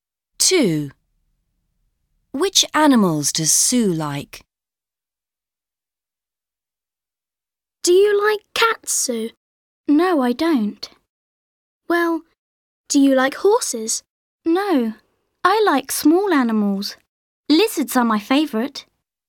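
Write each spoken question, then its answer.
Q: Which animals does Sue like?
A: Lizards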